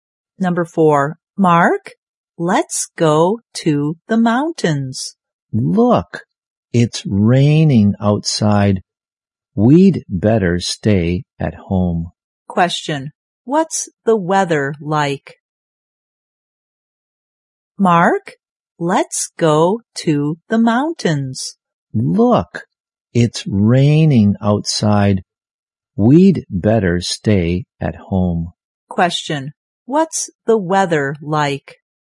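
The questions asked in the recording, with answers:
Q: Question. What's the weather like?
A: Rainy.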